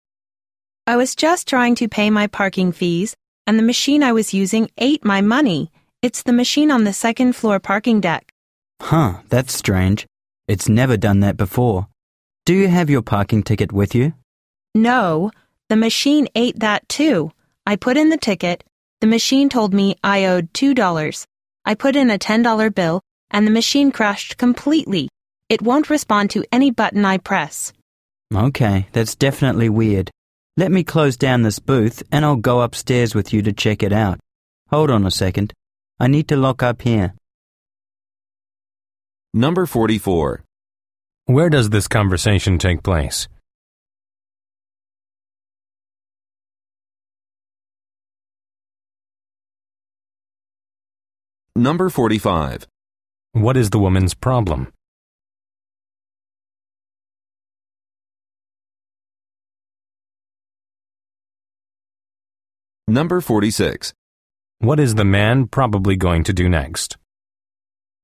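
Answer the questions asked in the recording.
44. In a parking garage
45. The parking machine took her money and ticket and crashed
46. Close the booth and go upstairs with her to check the machine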